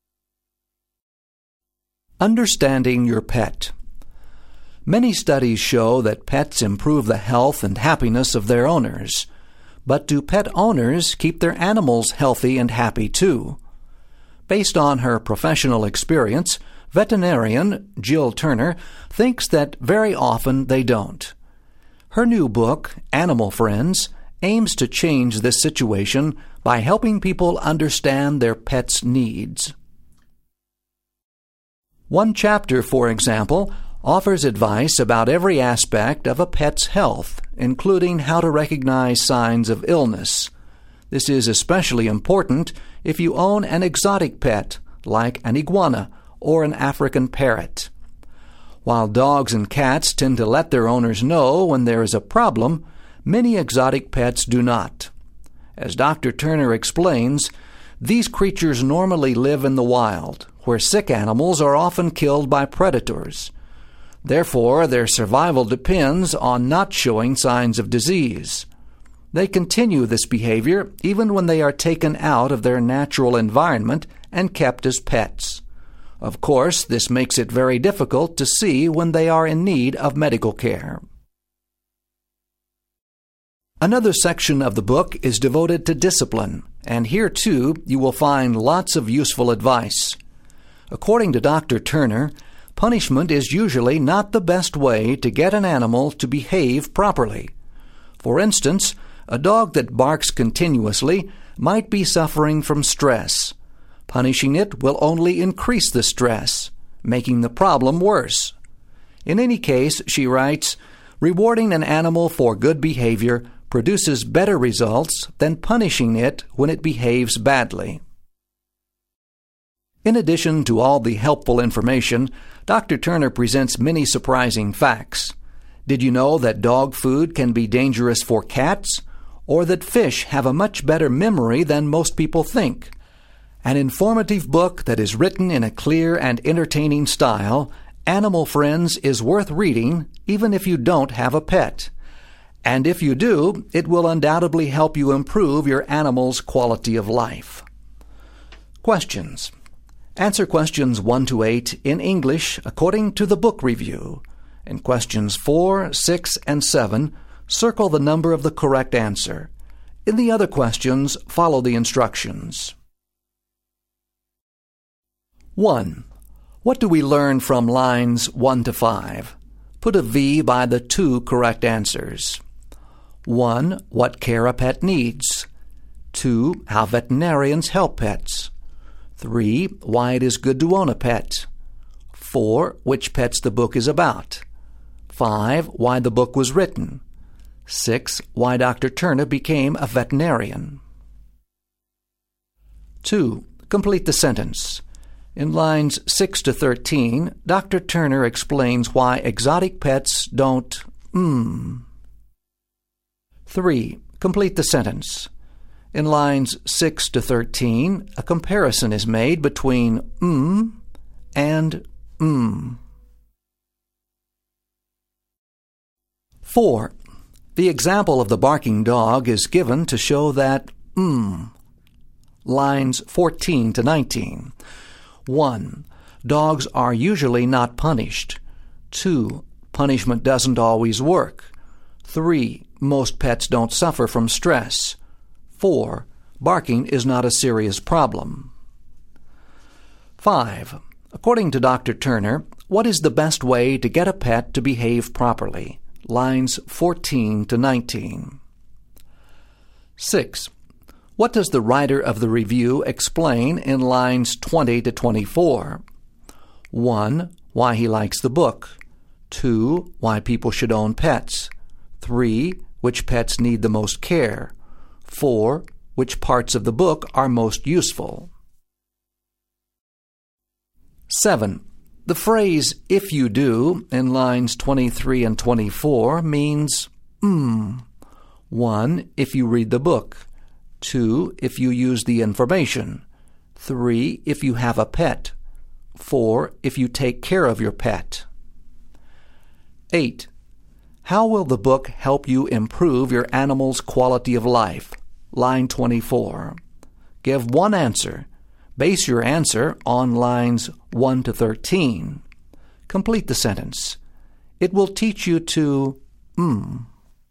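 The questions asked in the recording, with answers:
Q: Complete the sentence. In lines 6 to 13, Dr.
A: show signs of illness (they would be killed by predators in the wild)

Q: Complete the sentence. In lines 6 to 13, a comparison is made between and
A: exotic pets and dogs and cats

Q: The example of the barking dog is given to show that Lines 14 to 19.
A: 2: Punishment doesn't always work.

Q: According to Dr. Turner, what is the best way to get a pet to behave properly?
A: Rewarding it for good behavior

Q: What does the writer of the review explain in lines 20 to 24?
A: 1: Why he likes the book.

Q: The phrase, if you do, in lines 23 and 24 means, 1.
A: 3: If you have a pet.

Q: How will the book help you improve your animal's quality of life?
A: It will teach you to recognize signs of illness / understand your pet's needs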